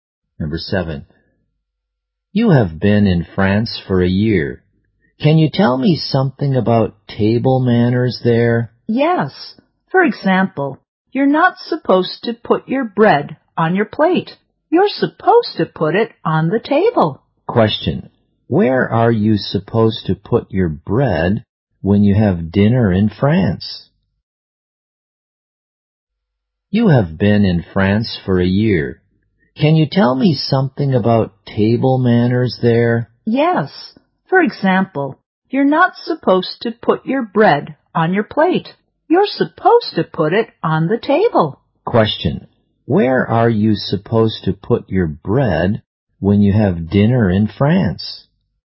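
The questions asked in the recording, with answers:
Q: Question. Where are you supposed to put your bread when you have dinner in France?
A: On the table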